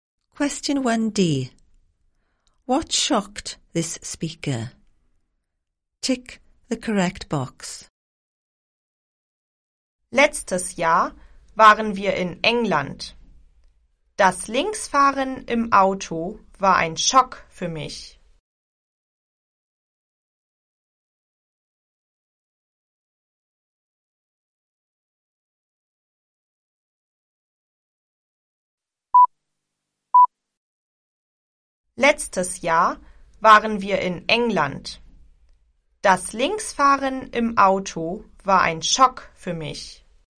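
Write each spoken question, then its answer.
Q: What shocked this speaker?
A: Driving on the left in England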